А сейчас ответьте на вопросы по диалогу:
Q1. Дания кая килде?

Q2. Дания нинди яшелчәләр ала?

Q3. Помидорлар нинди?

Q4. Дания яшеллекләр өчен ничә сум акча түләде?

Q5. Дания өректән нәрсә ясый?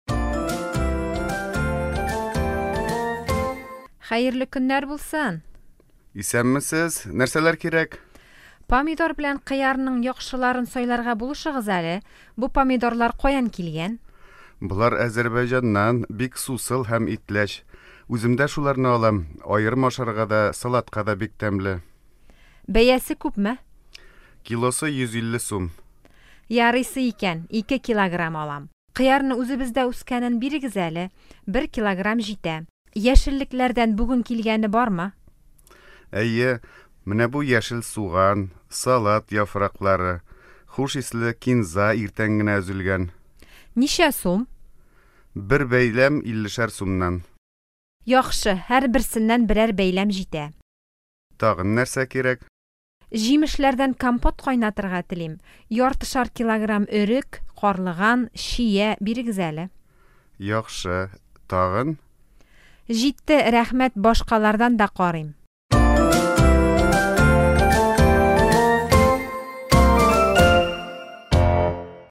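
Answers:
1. Базарга (җиләк-җимеш һәм яшелчәләр базарына)
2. Помидор һәм кыяр
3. Бик сусыл һәм итләч, Азәрбайҗаннан
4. 150 сум
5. Компот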